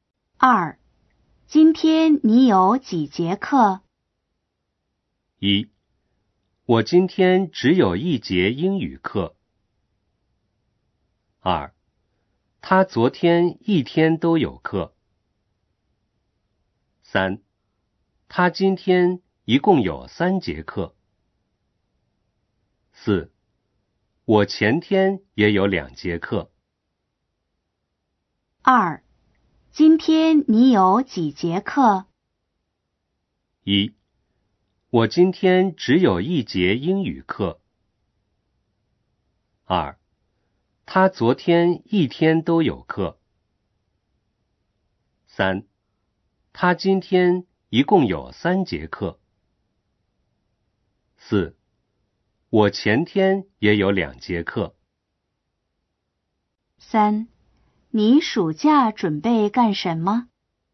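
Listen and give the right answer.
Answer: 一: 我今天只有一节英语课。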